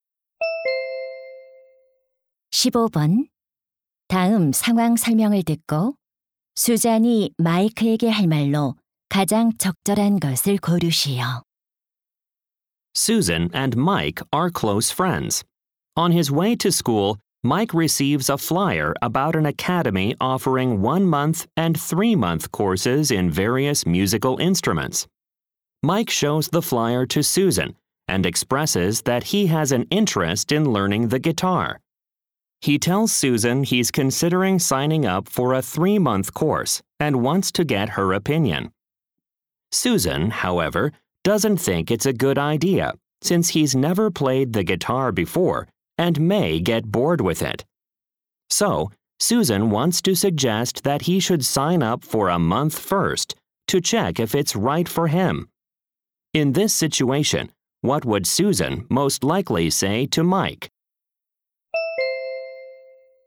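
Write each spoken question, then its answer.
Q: 다음 상황 설명을 듣고 수잔이 마이크에게 할 말로 가장 적절한 것을 고르시오.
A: 먼저 한 달 과정에 등록해서 맞는지 확인해 보라고 제안하는 말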